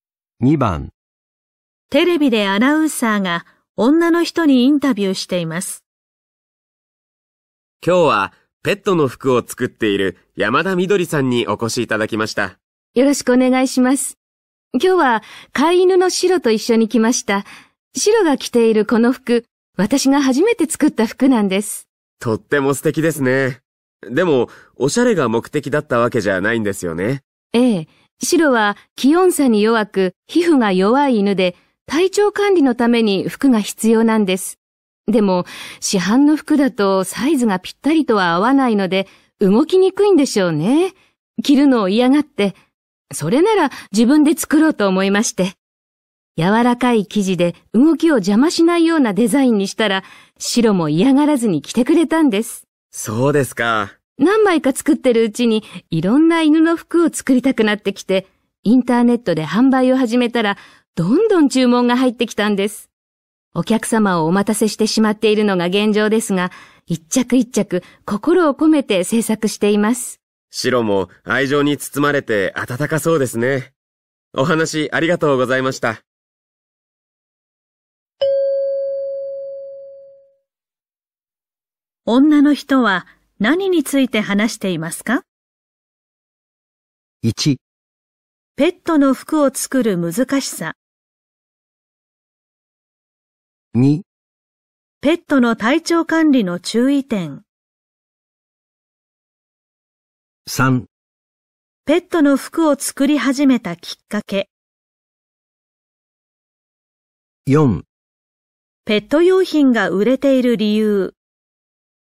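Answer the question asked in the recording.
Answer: 3: ペットの服を作り始めたきっかけ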